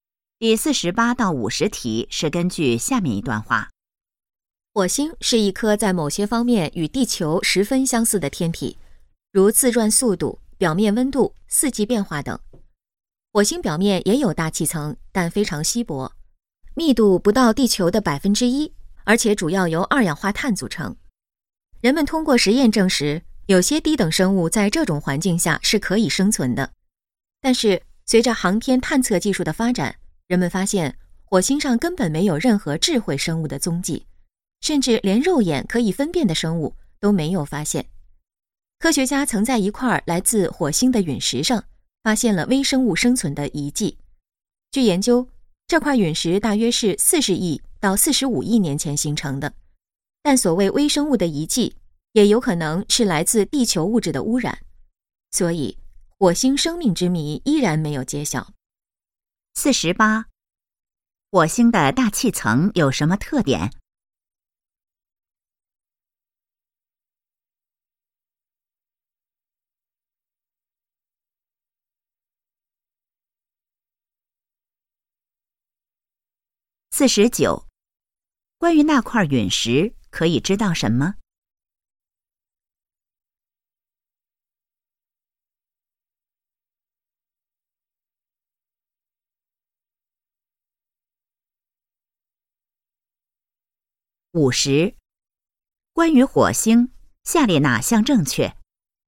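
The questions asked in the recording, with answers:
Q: 火星的大气层有什么特点?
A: 非常稀薄,主要由二氧化碳组成

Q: 关于那块陨石,可以知道什么?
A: 大约形成于40亿到45亿年前,上面有疑似微生物的遗迹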